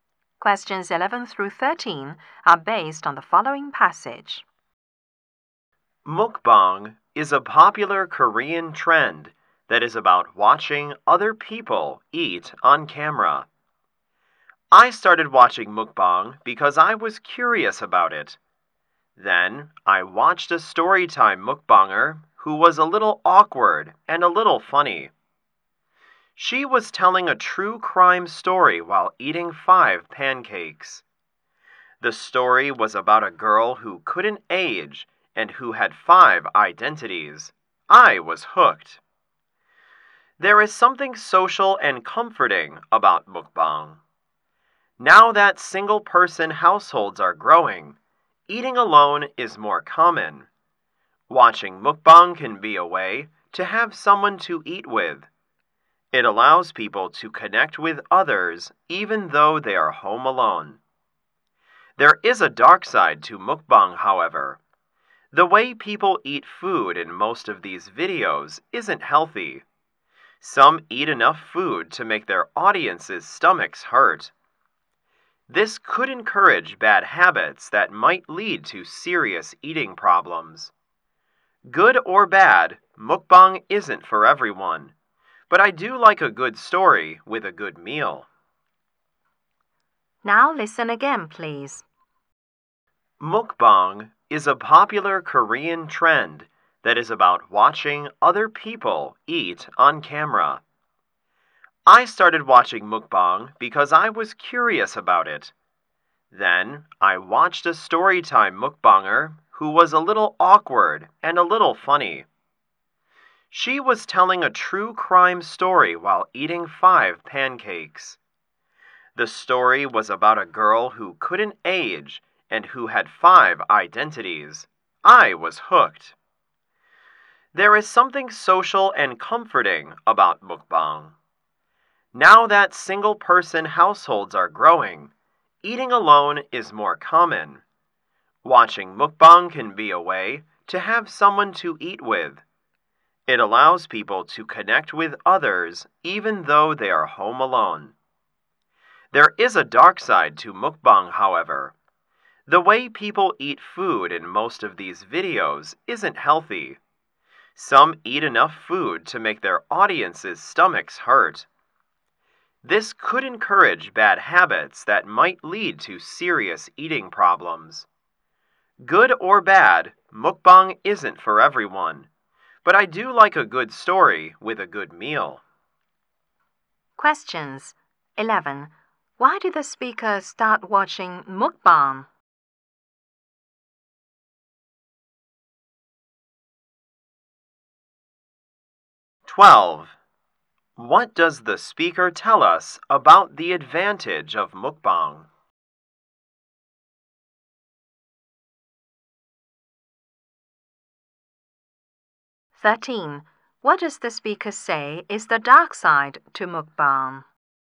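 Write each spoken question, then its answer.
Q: Why did the speaker start watching mukbang?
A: Because the speaker was curious about it

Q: What does the speaker tell us about the advantage of mukbang?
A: People who eat alone can feel connected to others

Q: What does the speaker say is the dark side to mukbang?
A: The unhealthy eating could lead to serious eating problems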